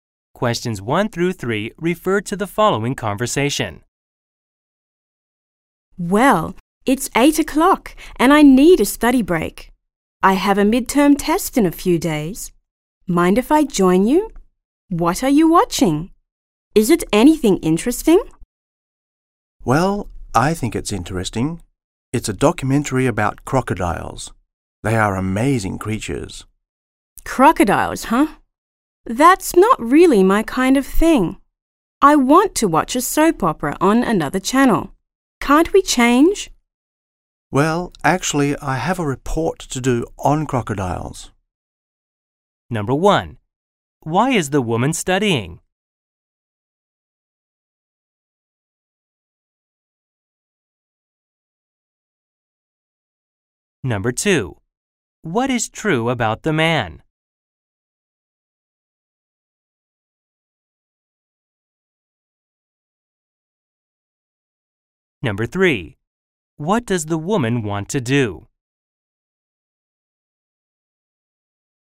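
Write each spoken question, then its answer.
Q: Why is the woman studying?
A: She has a midterm test in a few days.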